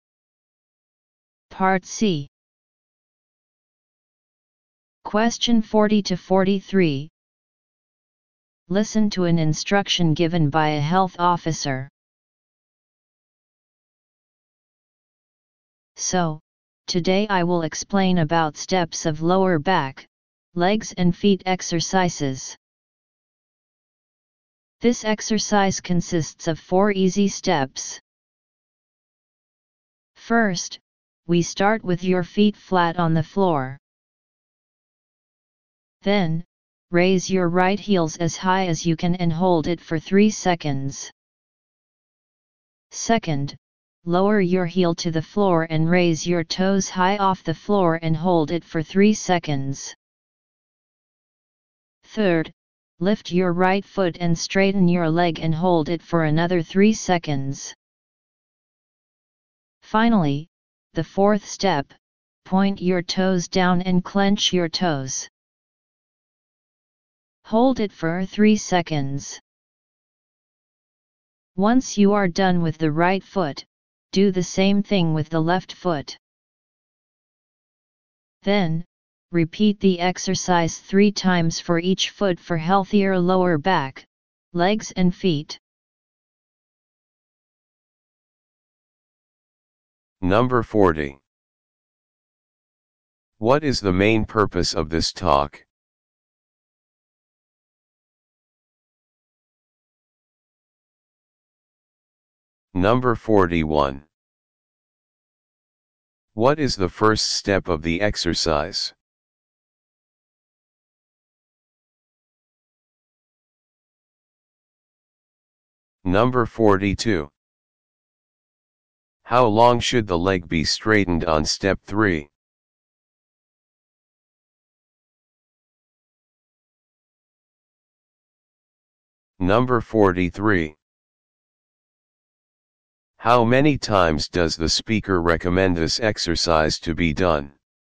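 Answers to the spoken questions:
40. To explain an exercise for the lower back, legs and feet
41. With feet flat on the floor, raise the right heel and hold for 3 seconds
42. 3 seconds
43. 3 times for each foot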